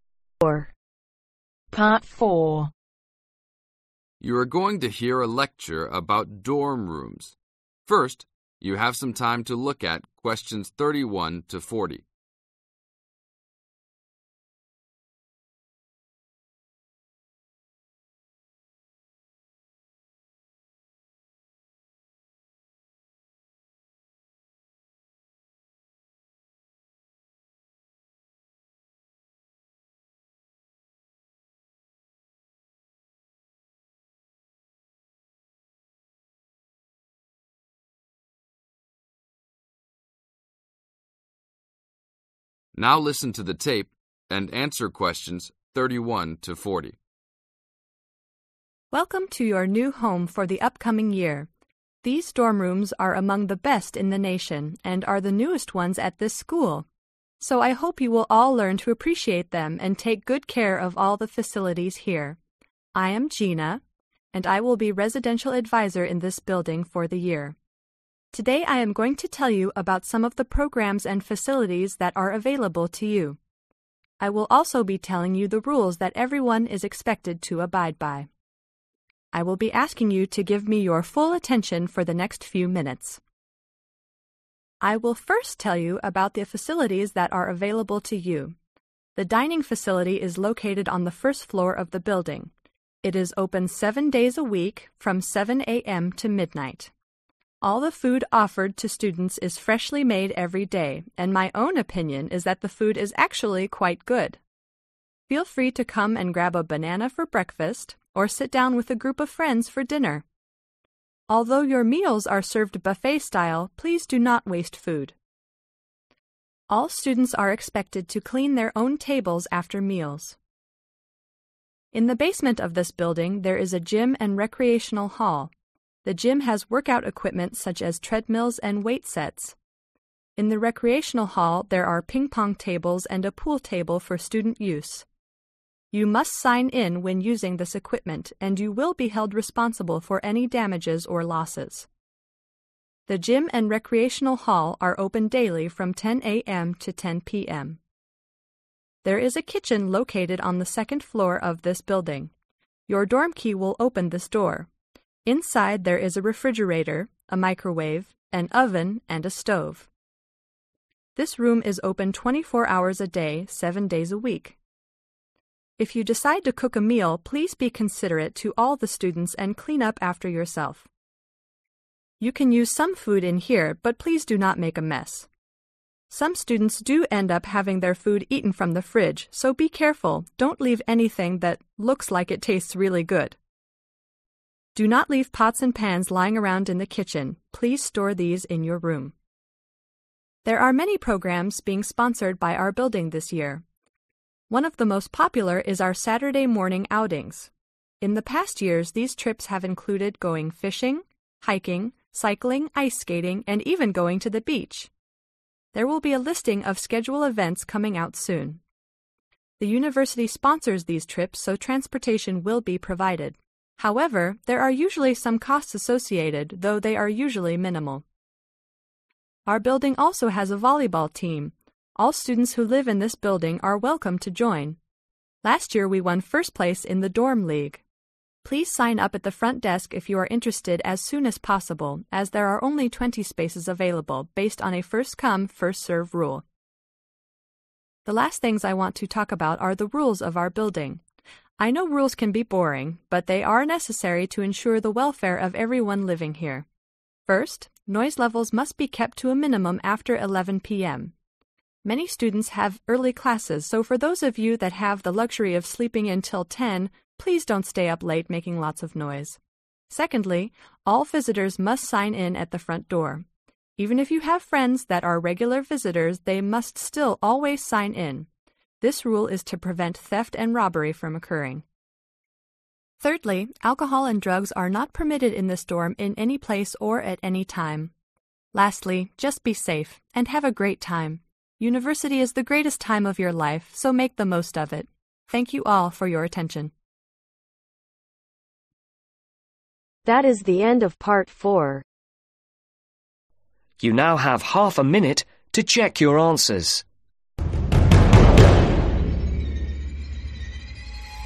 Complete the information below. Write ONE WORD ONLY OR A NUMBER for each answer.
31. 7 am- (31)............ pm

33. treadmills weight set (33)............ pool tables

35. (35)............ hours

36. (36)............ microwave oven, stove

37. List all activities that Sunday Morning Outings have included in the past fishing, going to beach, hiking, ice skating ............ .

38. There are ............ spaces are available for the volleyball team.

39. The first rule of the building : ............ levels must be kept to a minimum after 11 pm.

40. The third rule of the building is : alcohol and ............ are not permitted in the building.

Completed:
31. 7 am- 12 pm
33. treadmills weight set Ping-Pong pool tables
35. 24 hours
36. Refrigerator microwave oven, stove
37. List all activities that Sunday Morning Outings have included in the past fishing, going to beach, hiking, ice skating Cycling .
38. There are 20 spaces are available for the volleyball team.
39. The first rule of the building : Noise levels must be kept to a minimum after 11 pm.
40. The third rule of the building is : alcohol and Drugs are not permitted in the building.